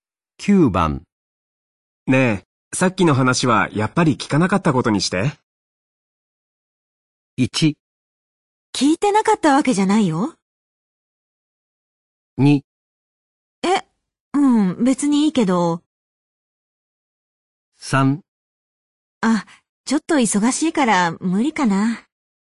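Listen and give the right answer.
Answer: 2: え、うん、別にいいけど。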